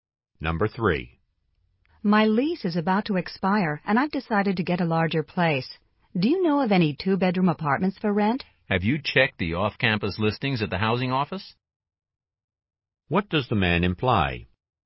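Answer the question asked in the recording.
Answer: She should check the off-campus listings at the housing office.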